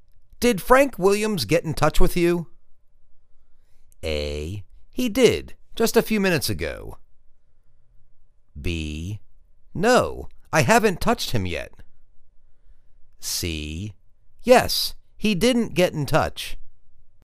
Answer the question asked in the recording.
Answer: He did. Just a few minutes ago.